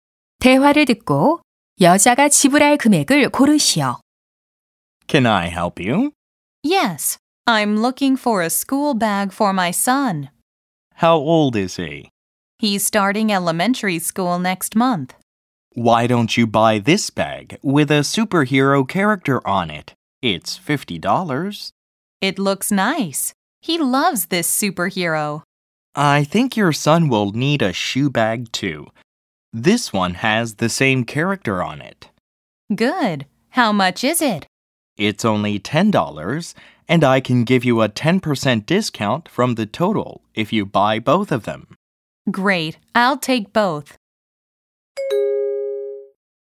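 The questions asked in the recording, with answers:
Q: 대화를 듣고 여자가 지불할 금액을 고르시오.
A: 54달러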